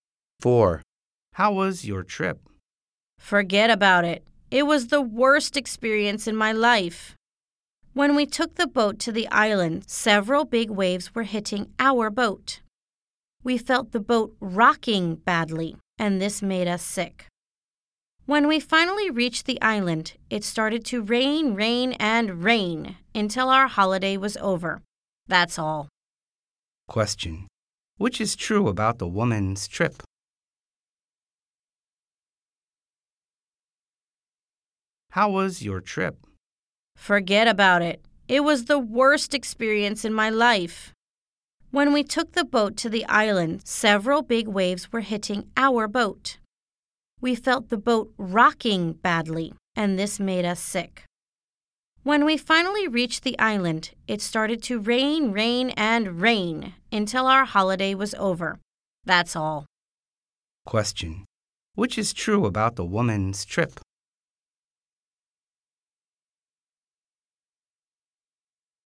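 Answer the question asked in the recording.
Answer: Big waves made her seasick on the boat, and it rained on the island until the holiday was over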